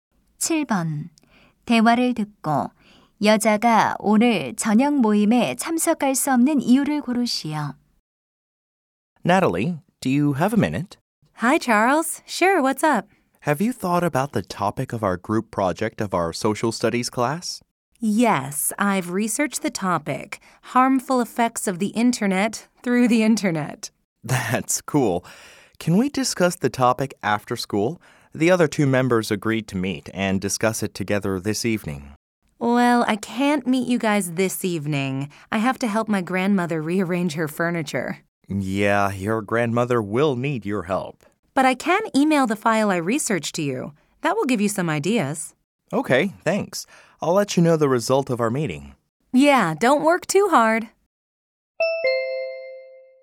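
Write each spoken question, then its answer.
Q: 대화를 듣고 여자가 오늘 저녁 모임에 참석할 수 없는 이유를 고르시오.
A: 할머니의 가구 재배치를 도와드려야 해서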